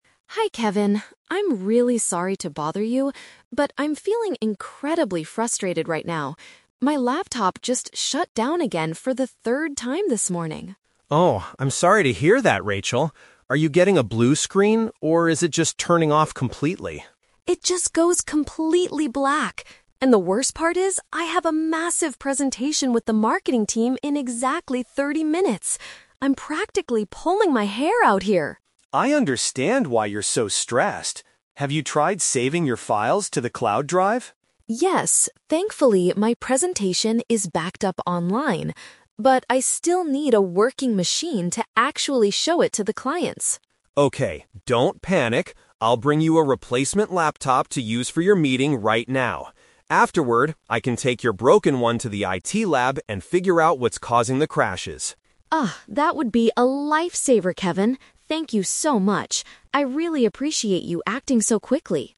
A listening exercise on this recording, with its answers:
Listen to the conversation between an office worker and an IT support staff member. Choose the correct answer (A, B, or C) for each question.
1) Why is Rachel feeling so frustrated?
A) Her computer is repeatedly turning off by itself.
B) She permanently lost her important presentation files.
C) She had a serious argument with the marketing team.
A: A) Her computer is repeatedly turning off by itself.

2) What is Rachel's main concern right now?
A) Her computer screen turned blue and froze.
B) She has to deliver a presentation very soon.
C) She does not know how to access the cloud drive.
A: B) She has to deliver a presentation very soon.

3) How will Kevin solve the immediate problem?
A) He will repair her broken computer right now.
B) He will lend her a different machine for the meeting.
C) He will contact the clients to delay the presentation.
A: B) He will lend her a different machine for the meeting.

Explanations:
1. The Key: Rachel says her laptop "just shut down again for th

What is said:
Rachel: Hi Kevin. I'm really sorry to bother you, but I'm feeling incredibly frustrated right now. My laptop just shut down again for the third time this morning.
Kevin: Oh, I'm sorry to hear that, Rachel. Are you getting a blue screen, or is it just turning off completely?
Rachel: It just goes completely black. And the worst part is, I have a massive presentation with the marketing team in exactly thirty minutes. I'm practically pulling my hair out here!
Kevin: I understand why you're so stressed. Have you tried saving your files to the cloud drive?
Rachel: Yes, thankfully my presentation is backed up online. But I still need a working machine to actually show it to the clients.
Kevin: Okay, don't panic. I'll bring you a replacement laptop to use for your meeting right now. Afterward, I can take your broken one to the IT lab and figure out what's causing the crashes.
Rachel: Oh, that would be a lifesaver, Kevin. Thank you so much. I really appreciate you acting so quickly.

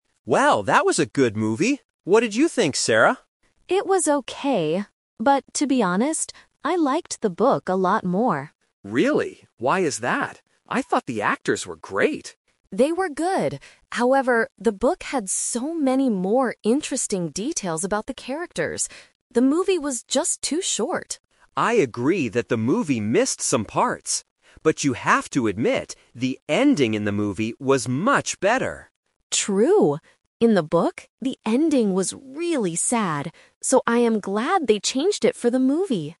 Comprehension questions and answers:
Listen to two friends talking after watching a movie. Choose the correct answer A, B, or C.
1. What did Sarah like more overall?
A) The movie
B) The book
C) The actors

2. Why did Sarah prefer the book?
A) Because the movie was too long.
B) Because it had great actors.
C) Because it had more details.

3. What did both friends like about the movie?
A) The happy ending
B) The interesting characters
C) The sad story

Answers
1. B) The book
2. C) Because it had more details.
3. A) The happy ending

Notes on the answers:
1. Sarah says directly, "I liked the book a lot more." Option A is what Alex liked initially. Option C is a trap because the actors are mentioned as being "great", but they are not what Sarah liked most overall.
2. Sarah explains that "the book had so many more interesting details." Option A is a trap using opposite words (she said the movie was too short, not too long). Option B is a trap because the movie had great actors, not the book.
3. Alex says "the ending in the movie was much better" and Sarah agrees by saying "True!... I am glad they changed it." Option B is a trap because the book had better details about the characters. Option C is a trap because the book had the sad story/ending, which they did not like.

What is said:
Alex: Well, that was a good movie! What did you think, Sarah?
Sarah: It was okay. But to be honest, I liked the book a lot more.
Alex: Really? Why is that? I thought the actors were great.
Sarah: They were good. However, the book had so many more interesting details about the characters. The movie was just too short.
Alex: I agree that the movie missed some parts. But you have to admit, the ending in the movie was much better!
Sarah: True! In the book, the ending was really sad. So, I am glad they changed it for the movie.

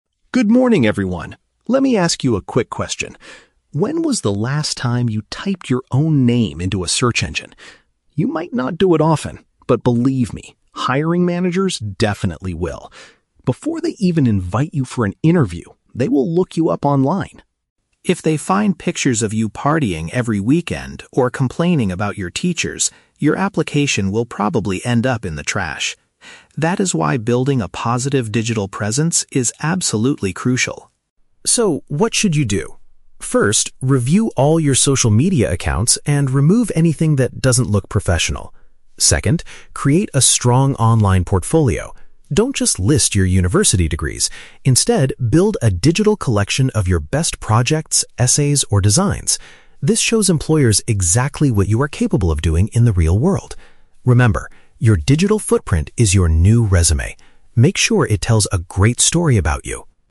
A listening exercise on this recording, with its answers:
Listen to a speaker at a student seminar and choose the correct answer (A, B, or C) for each question.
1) What will employers usually do before contacting a candidate?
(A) Ask the candidate's university teachers for a recommendation.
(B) Research the applicant's name on the internet.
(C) Review the candidate's physical paper resume.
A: (B) Research the applicant's name on the internet.

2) What does the speaker advise students to do with their social media?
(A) Delete any posts that might create a negative impression.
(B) Completely deactivate their accounts to maintain privacy.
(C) Share updates about their fun weekend activities with friends.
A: (A) Delete any posts that might create a negative impression.

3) How does the speaker describe a strong online portfolio?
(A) A detailed list of all the university courses you have passed.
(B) A written document explaining your future career goals.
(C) An electronic display of your most successful work.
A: (C) An electronic display of your most successful work.

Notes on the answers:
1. Alex states that hiring managers will "type your own name into a search engine" and "look you up online". Option (B) correctly paraphrases this action. Option (A) is The Trap: The word "teachers" is mentioned in the audio, but in the context of students complaining about them, not employers calling them. Option (C) is plausible but not the focus of this part of the talk.
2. The speaker advises students to "review all your social media accounts and remove anything that doesn't look professional." Option (A) uses synonyms to express this (delete = remove; negative impression = doesn't look professional). Option (C) is The Trap: "Partying every weekend" is mentioned as a specific example of something that will get your application thrown "in the trash," so you should not share it. Option (B) is never mentioned.
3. Alex tells the audience to build a "digital collection of your best projects, essays, or designs." Option (C) is a precise paraphrase (electronic display = digital collection; most successful work = best projects). Option (A) is The Trap: The speaker explicitly warns, "Don't just list your university degrees." Option (B) is not mentioned in the audio.

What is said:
Alex: Good morning, everyone! Let me ask you a quick question: when was the last time you typed your own name into a search engine? You might not do it often, but believe me, hiring managers definitely will. Before they even invite you for an interview, they will look you up online.
If they find pictures of you partying every weekend or complaining about your teachers, your application will probably end up in the trash. That is why building a positive digital presence is absolutely crucial.
So, what should you do? First, review all your social media accounts and remove anything that doesn't look professional. Second, create a strong online portfolio. Don't just list your university degrees; instead, build a digital collection of your best projects, essays, or designs. This shows employers exactly what you are capable of doing in the real world. Remember, your digital footprint is your new resume. Make sure it tells a great story about you!

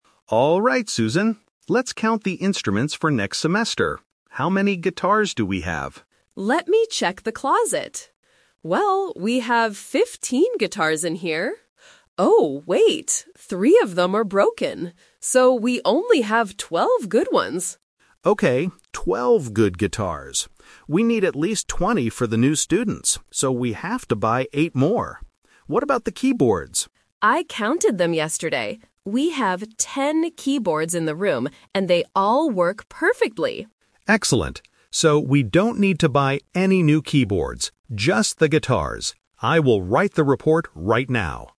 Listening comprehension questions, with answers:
Listen to two music teachers talking. Choose the correct answer (A, B, or C) for each question.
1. How many good guitars do they have right now?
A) 12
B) 15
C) 20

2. What are they going to buy for next semester?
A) New keyboards.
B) Some new guitars.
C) Both guitars and keyboards.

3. Why do they decide NOT to buy new keyboards?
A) Because keyboards are too expensive.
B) Because the students don't like playing them.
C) Because they already have enough good ones.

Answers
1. A) 12
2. B) Some new guitars.
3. C) Because they already have enough good ones.

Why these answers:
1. The woman says, "So we only have 12 good ones." Option (B) is a trap because 15 is the total number of guitars before she realizes three are broken. Option (C) is a trap because 20 is the number of guitars they need in the future, not what they have now.
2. The man says, "...so we have to buy 8 more [guitars]" and confirms at the end, "Just the guitars." Option (A) is a trap because they talk about keyboards, but explicitly say they "don't need to buy any new keyboards." Option (C) is incorrect for the same reason.
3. The woman states that they have 10 keyboards "and they all work perfectly," meaning they have enough functional ones. Options (A) and (B) are plausible reasons in real life, but they are never mentioned in the audio.

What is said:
Man: Alright, Susan, let's count the instruments for next semester. How many guitars do we have?
Woman: Let me check the closet. Well, we have 15 guitars in here. Oh, wait! Three of them are broken. So we only have 12 good ones.
Man: Okay, 12 good guitars. We need at least 20 for the new students, so we have to buy 8 more. What about the keyboards?
Woman: I counted them yesterday. We have 10 keyboards in the room, and they all work perfectly.
Man: Excellent. So we don't need to buy any new keyboards. Just the guitars. I will write the report right now.

